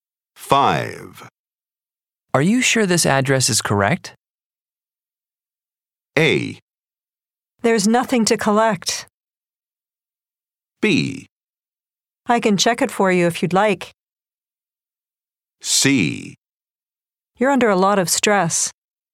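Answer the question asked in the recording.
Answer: B: I can check it for you if you'd like.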